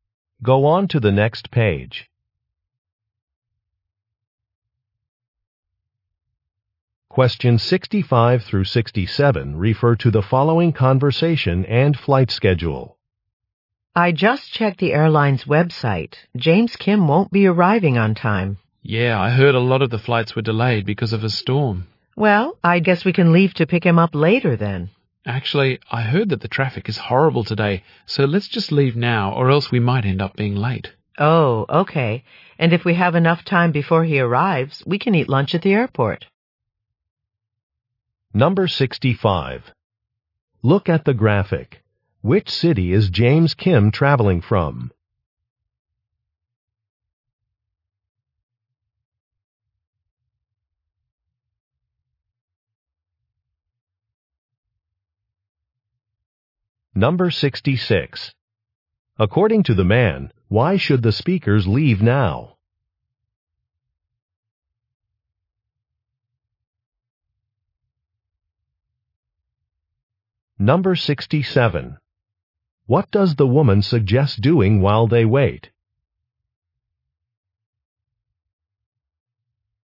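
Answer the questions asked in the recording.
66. Traffic is horrible
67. Eating lunch at the airport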